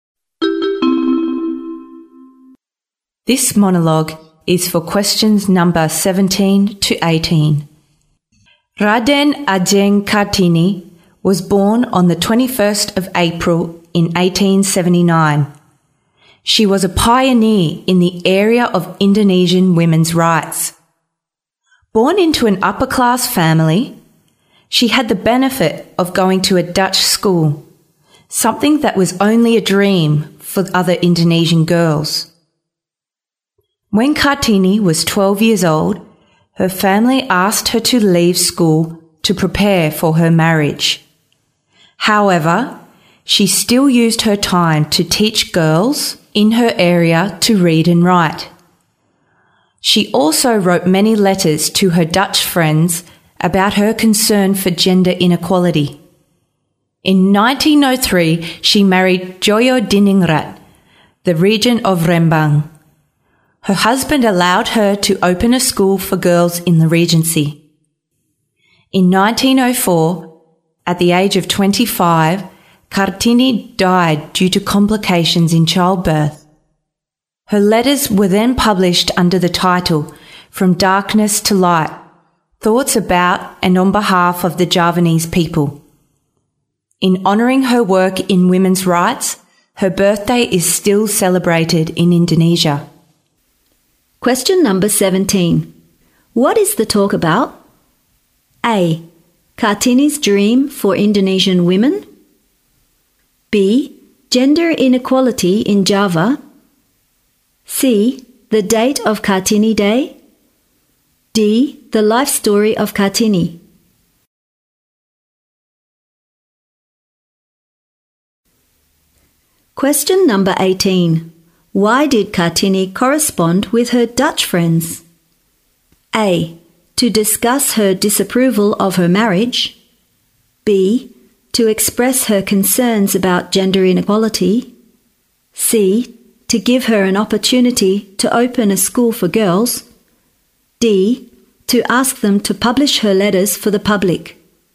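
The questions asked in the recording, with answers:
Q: What is the talk about?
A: D: The life story of Kartini.

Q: Why did Kartini correspond with her Dutch friends?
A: B: To express her concerns about gender inequality.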